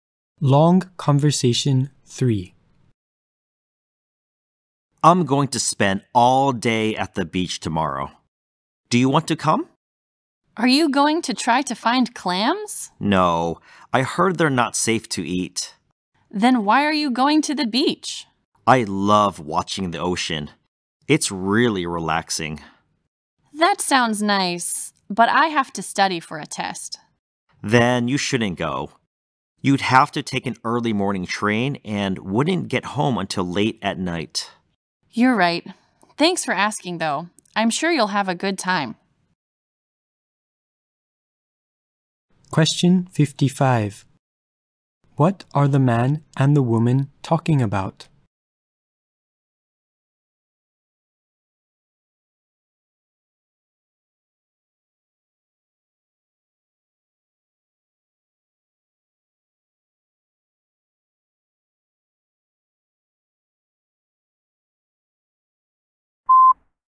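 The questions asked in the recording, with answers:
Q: What are the man and the woman talking about?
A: Going to the beach tomorrow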